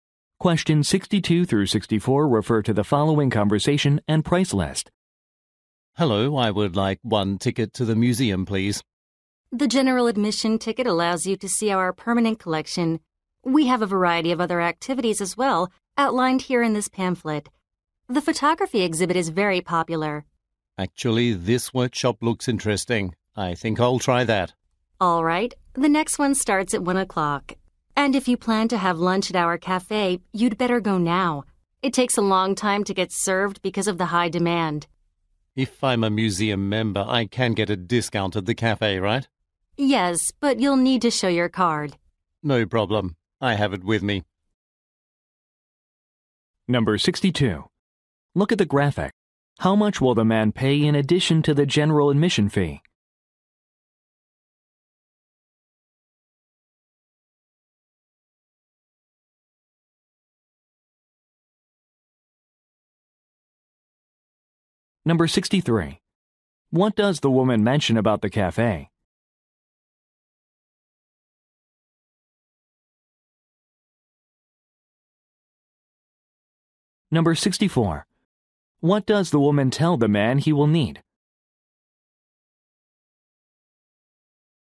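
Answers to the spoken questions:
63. It takes a long time to get served
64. His membership card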